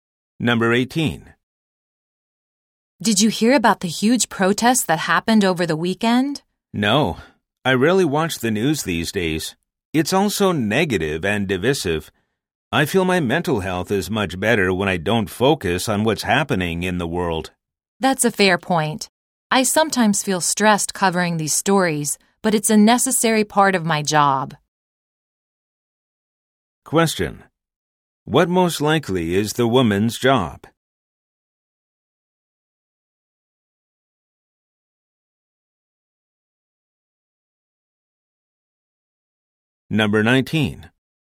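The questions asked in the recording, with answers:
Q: What most likely is the woman's job?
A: A journalist/news reporter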